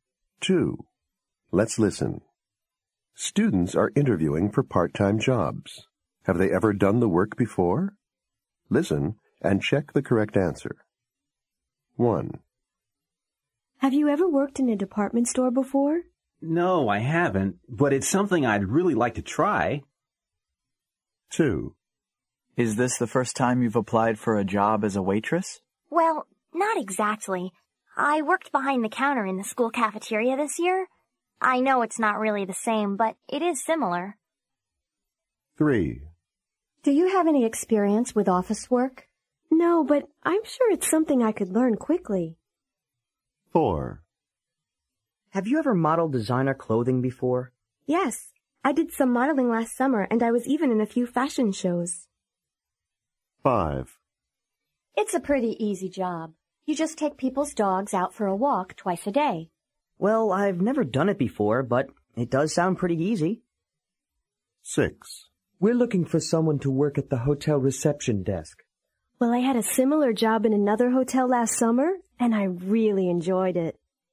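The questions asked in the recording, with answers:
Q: Have they ever done the work before?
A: No

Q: Have they ever done the work before?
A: No

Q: Have they ever done the work before?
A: Yes

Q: Have they ever done the work before?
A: No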